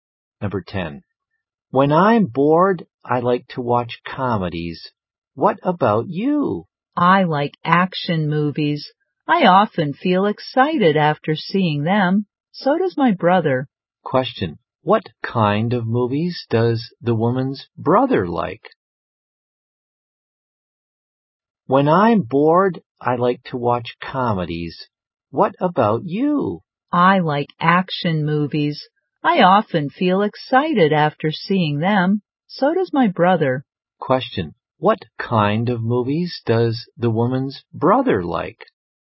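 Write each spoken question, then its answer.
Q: What kind of movies does the woman's brother like?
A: Action movies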